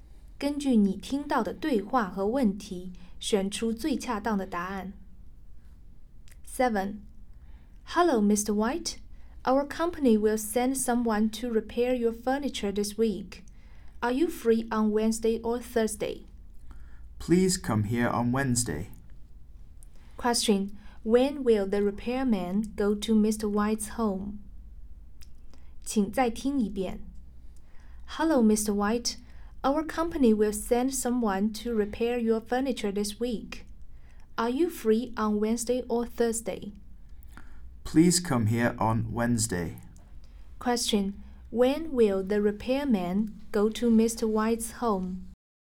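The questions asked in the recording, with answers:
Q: When will the repairman go to Mr. White's home?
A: On Wednesday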